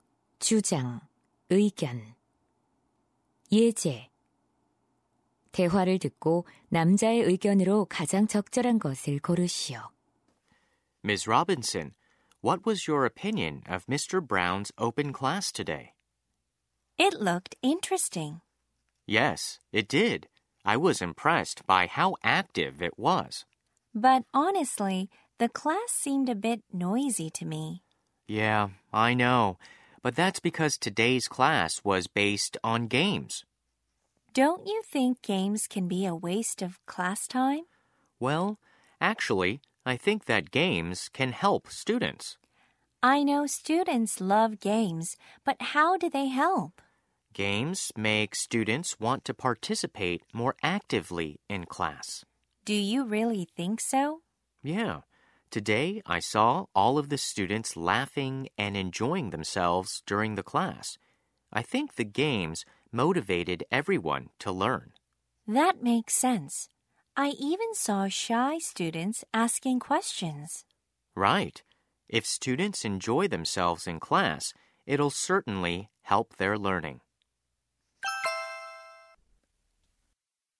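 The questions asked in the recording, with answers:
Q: 대화를 듣고 남자의 의견으로 가장 적절한 것을 고르시오.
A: 게임은 학생들의 수업 참여와 학습 동기를 높여 학습에 도움이 된다.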